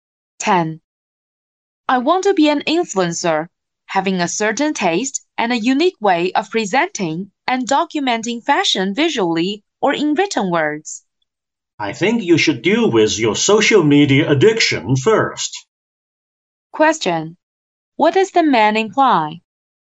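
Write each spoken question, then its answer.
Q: What does the man imply?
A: The woman is addicted to social media.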